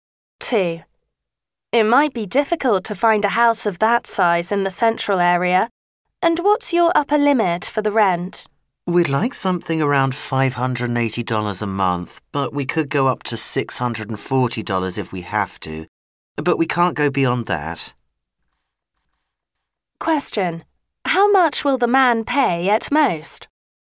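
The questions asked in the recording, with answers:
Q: How much will the man pay at most?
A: $640 a month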